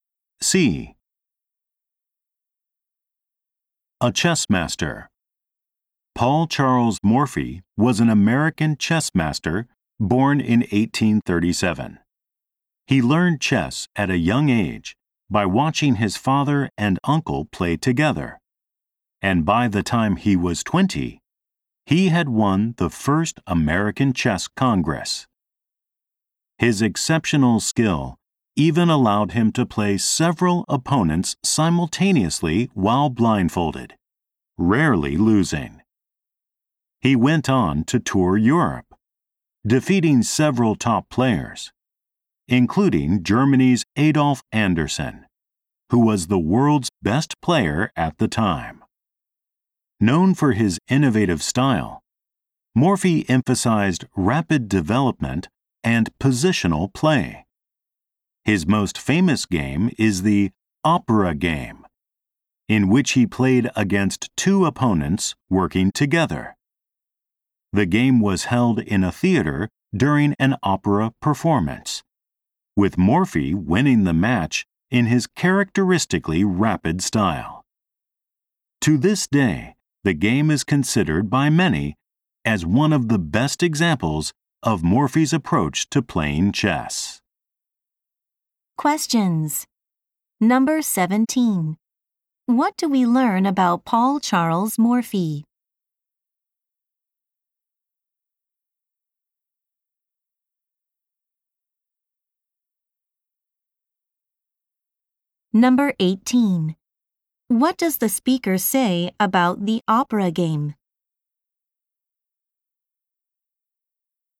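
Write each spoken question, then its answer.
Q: What do we learn about Paul Charles Morphy?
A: He could play several opponents at once while blindfolded and rarely lost.

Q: What does the speaker say about the opera game?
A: Many consider it one of the best examples of Morphy's approach to chess.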